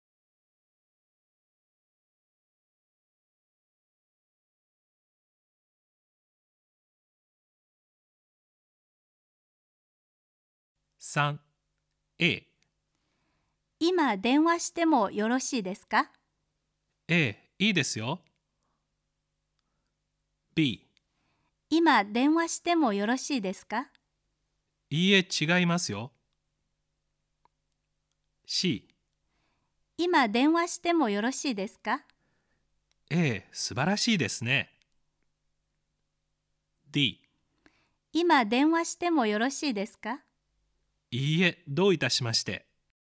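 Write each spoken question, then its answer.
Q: 今電話してもよろしいですか?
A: A: いいですよ。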